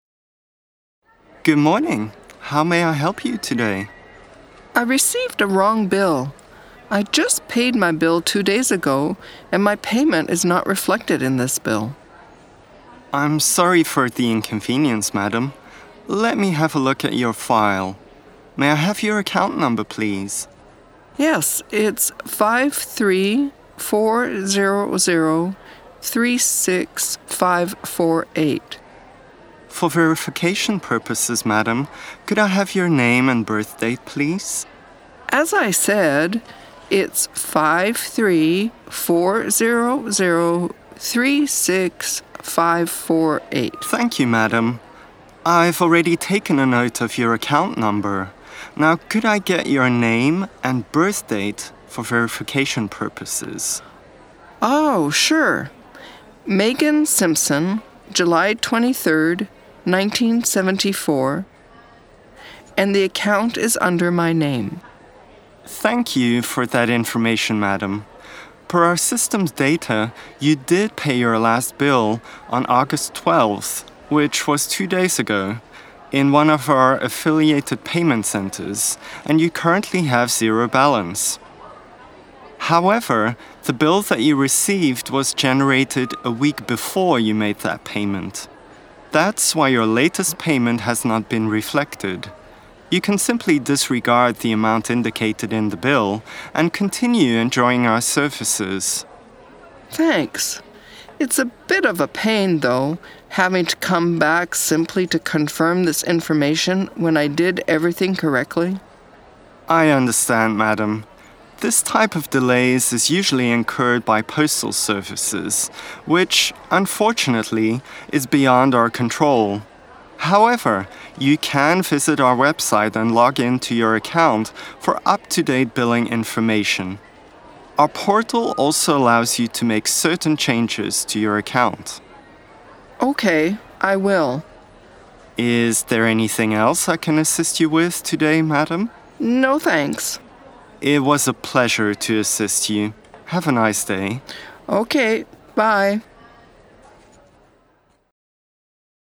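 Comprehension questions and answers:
Now, listen to the dialogue and answer the questions below.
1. What is the problem with the bill?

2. What information does the agent need to validate?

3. What is the customer's account number?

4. What is the customer's date of birth (Month day, year)?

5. What should the customer do next?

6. Who or what is to blame for the problem?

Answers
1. Her recent payment is not reflected in the bill
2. Her name and birth date
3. 53400-36548
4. July 23, 1974
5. Disregard the amount on the bill
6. Postal service delays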